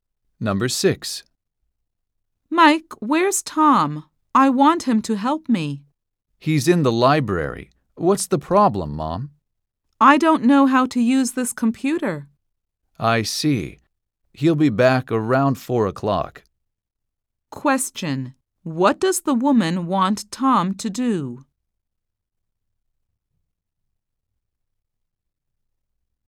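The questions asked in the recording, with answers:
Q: what does the woman want Tom to do?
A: Help her use the computer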